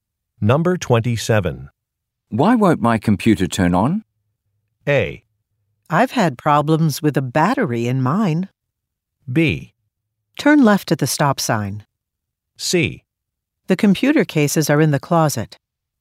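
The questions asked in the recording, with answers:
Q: Why won't my computer turn on?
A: A: I've had problems with a battery in mine.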